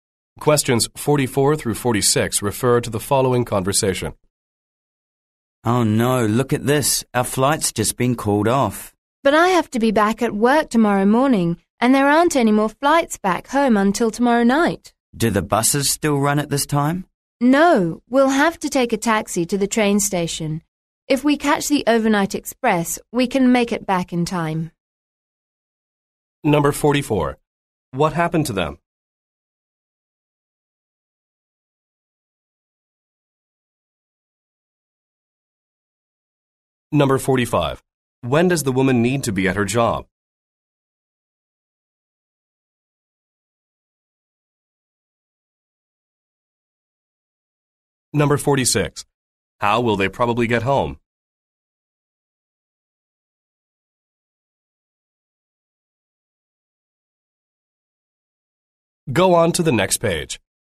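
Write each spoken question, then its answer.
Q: What happened to them?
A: Their flight was canceled

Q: When does the woman need to be at her job?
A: Tomorrow morning

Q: How will they probably get home?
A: By the overnight express train (after a taxi to the station)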